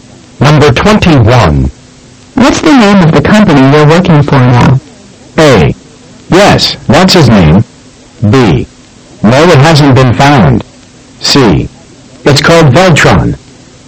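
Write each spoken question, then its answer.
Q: What's the name of the company you're working for now?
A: C: It's called Veltron.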